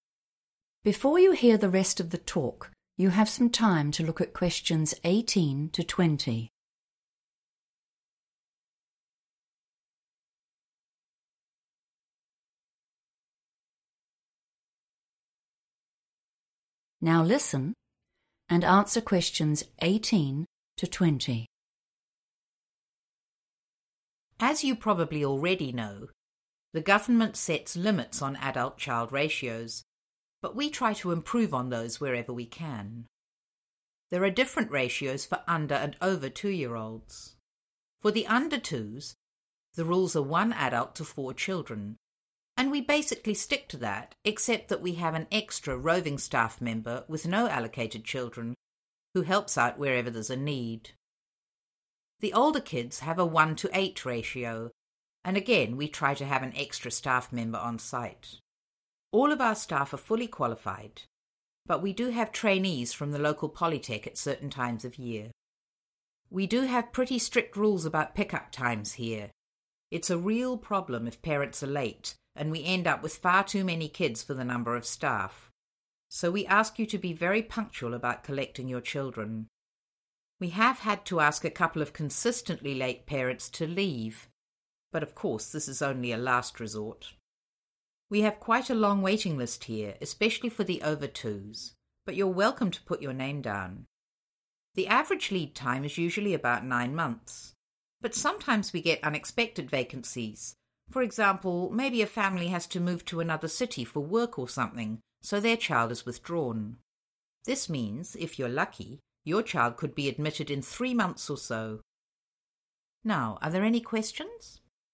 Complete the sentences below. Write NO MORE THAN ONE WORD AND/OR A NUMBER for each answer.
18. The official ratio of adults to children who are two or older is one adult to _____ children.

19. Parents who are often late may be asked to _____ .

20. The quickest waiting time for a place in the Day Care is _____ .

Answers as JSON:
{"18": "8 / eight", "19": "leave", "20": "3 months"}

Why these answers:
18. The correct answer is 8 or eight because Doreen explains that the childcare center follows specific rules for child-to-adult ratios based on age. For the 'older kids'—which refers to those who are two or older—she explicitly mentions that they use a ratio of one adult to 8 children.
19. The correct answer is "leave" because the speaker explains that the center has strict rules about when children must be picked up. If parents are late too often, it creates a problem with the ratio of staff members to children. The speaker mentions that they have actually had to tell parents who are "consistently late" (which means often late) to "leave" the center as a final solution.
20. The correct answer is correct because the person talking explains that while most families wait for nine months, some special situations allow a child to start much faster. The speaker mentions that if they are lucky, a child could start in 'three months.' In the question, the word 'quickest' refers to this shorter possible time compared to the nine-month average.

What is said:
The ground is covered with bark so it's not a harsh surface when they do fall. The ordinary swings and a tyre swing are here in front where we can keep an eye on everyone, and then the chickens are way over on the far right, so they can have a bit of peace and quiet occasionally!
Ok, so let's go back inside and I can talk about our rules and policies.
Before you hear the rest of the talk, you have some time to look at questions 18 to 20.
Now listen and answer questions 18 to 20.
As you probably already know, the government sets limits on adult/child ratios, but we try to improve on those wherever we can. There are different ratios for under and over 2 year olds. For the under twos, the rules are one adult to four children, and we basically stick to that except that we have an extra, roving staff member with no allocated children who helps out wherever there's a need. The older kids have a one to 8 ratio, and again, we try to have an extra staff member on site. All of our staff are fully qualified, but we do have trainees from the local polytech at certain times of the year.
We do have pretty strict rules about pickup times here. It's a real problem if parents are late and we end up with far too many kids for the number of staff, so we ask you to be very punctual about collecting your children. We have had to ask a couple of consistently late parents to leave, but of course this is only a last resort.
We have quite a long waiting list here, especially for the over twos, but you're welcome to put your name down. The average lead time is usually about 9 months, but sometimes we get unexpected vacancies, for example, maybe a family has to move to another city for work or something so their child is withdrawn. This means, if you're lucky, your child could be admitted in three months or so.
Now, are there any questions ...